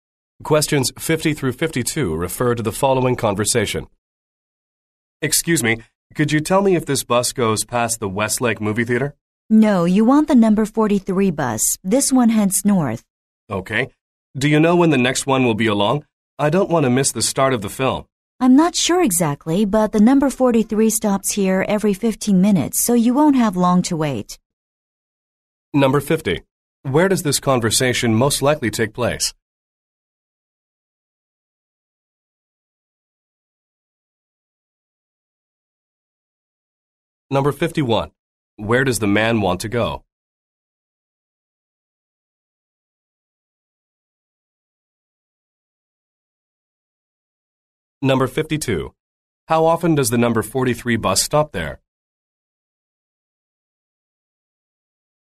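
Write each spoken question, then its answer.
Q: Where does this conversation most likely take place?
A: At a bus stop

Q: Where does the man want to go?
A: The Westlake movie theater

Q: How often does the number 43 bus stop there?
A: Every 15 minutes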